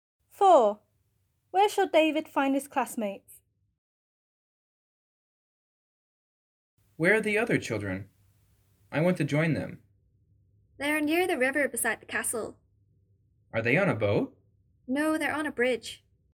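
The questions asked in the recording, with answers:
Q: Where shall David find his classmates?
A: On a bridge near the river beside the castle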